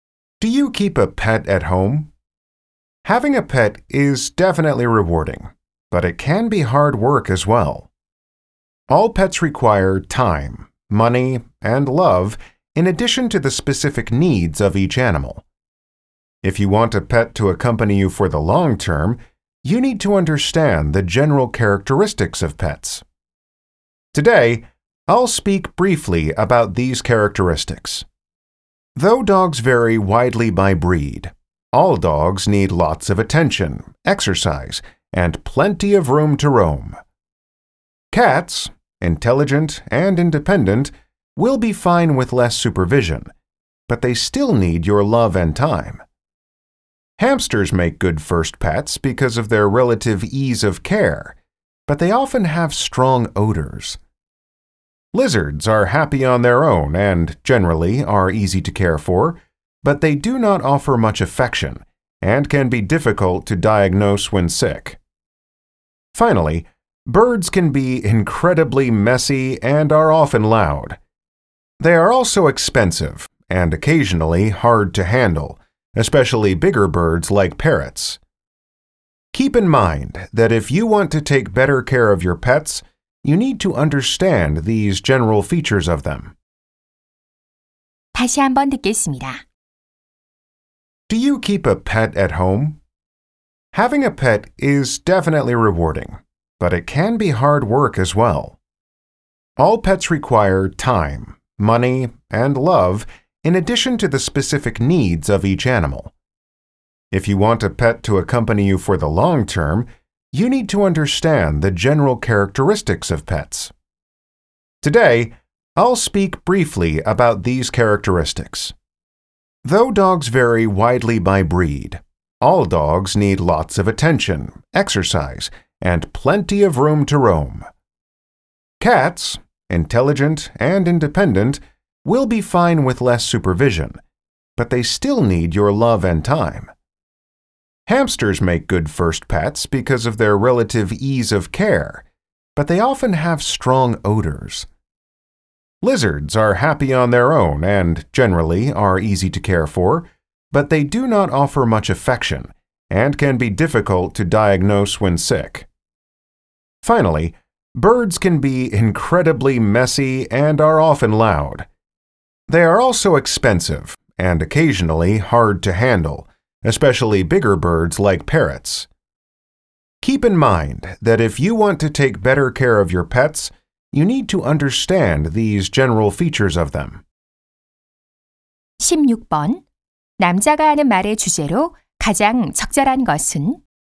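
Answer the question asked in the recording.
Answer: 애완동물의 일반적인 특성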